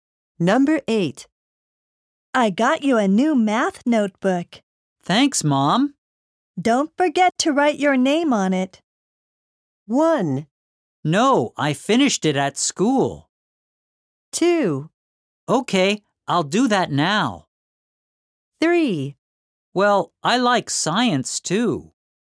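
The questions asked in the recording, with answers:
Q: Don't forget to write your name on it.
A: 2: Okay, I'll do that now.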